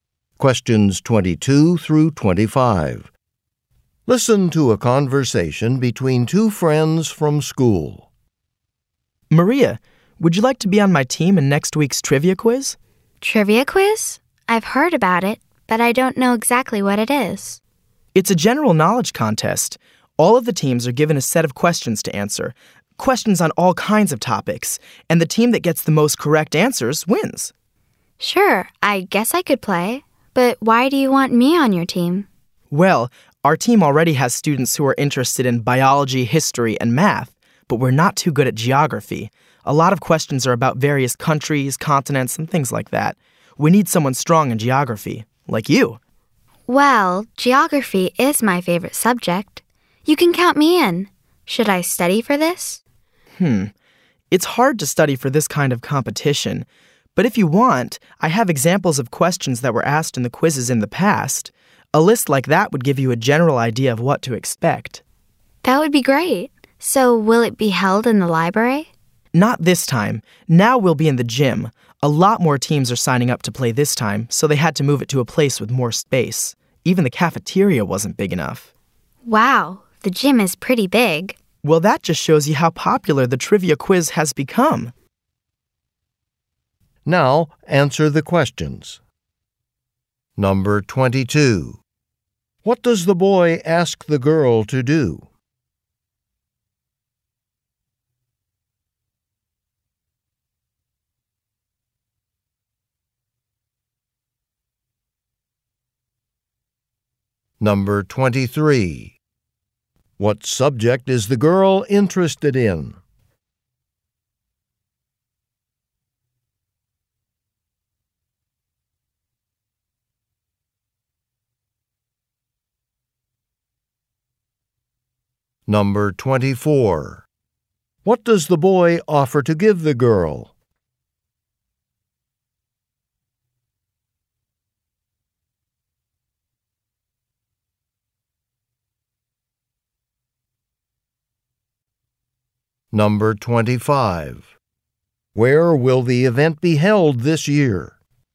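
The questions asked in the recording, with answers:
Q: What does the boy ask the girl to do?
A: Join his team in the trivia quiz

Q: What subject is the girl interested in?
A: Geography

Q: What does the boy offer to give the girl?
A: A list of example questions from past quizzes

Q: Where will the event be held this year?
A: In the gym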